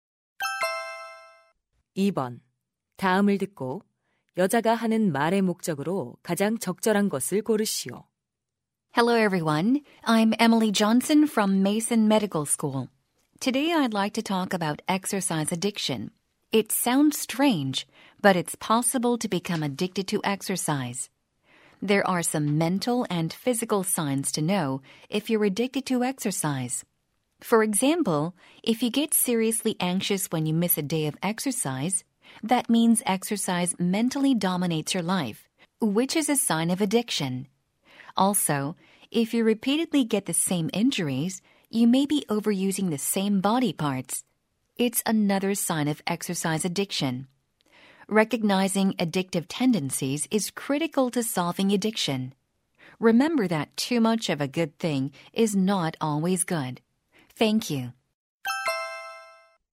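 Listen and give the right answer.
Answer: 운동 중독의 징후를 알려 주려고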